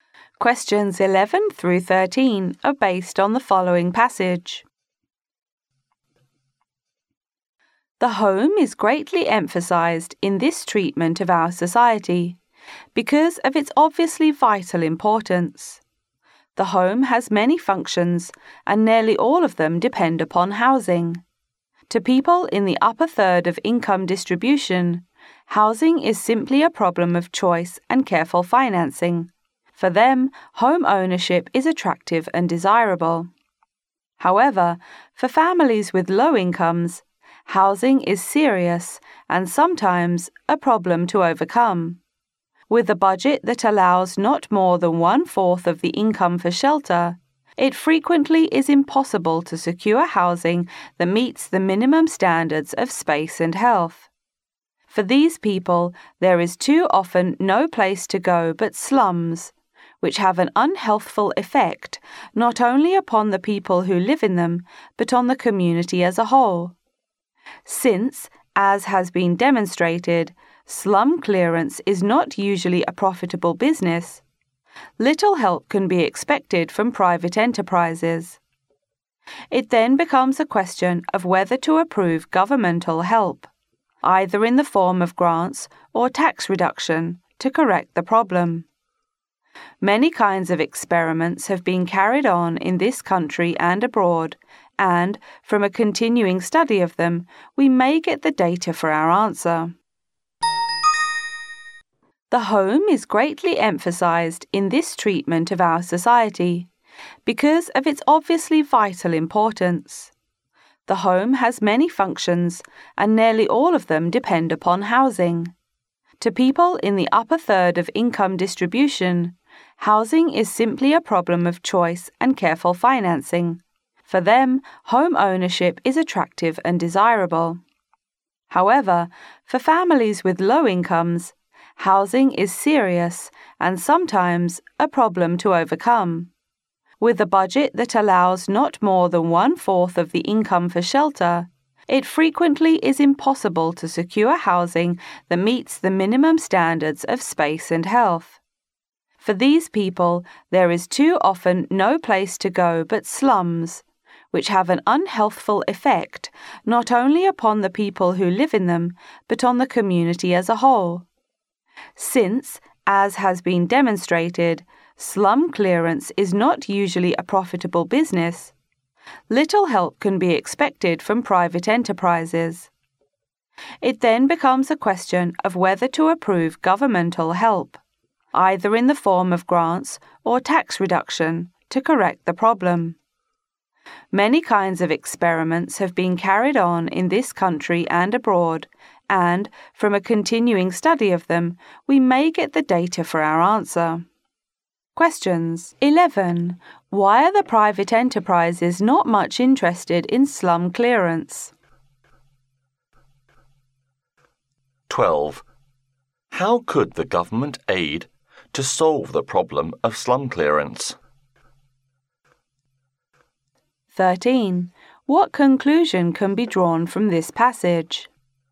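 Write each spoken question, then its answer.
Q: Why are the private enterprises not much interested in slum clearance?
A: Because slum clearance is not usually profitable

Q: How could the government aid to solve the problem of slum clearance?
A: Through grants or tax reduction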